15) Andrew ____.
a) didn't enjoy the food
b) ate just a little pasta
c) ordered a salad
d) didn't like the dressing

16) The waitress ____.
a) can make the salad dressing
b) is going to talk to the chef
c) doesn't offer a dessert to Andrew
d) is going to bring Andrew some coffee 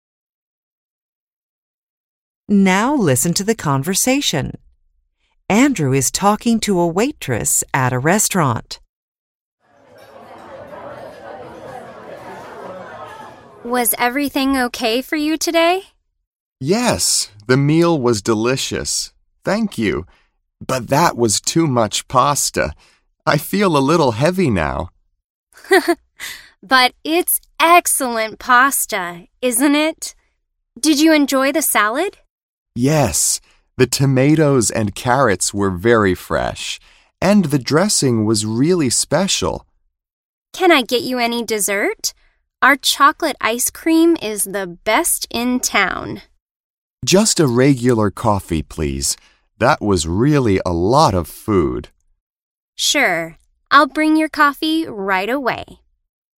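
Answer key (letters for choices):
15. c
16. d

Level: BEGINNERS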